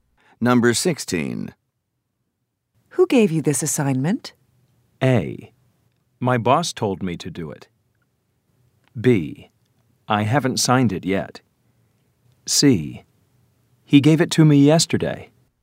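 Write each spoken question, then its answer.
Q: Who gave you this assignment?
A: A: My boss told me to do it.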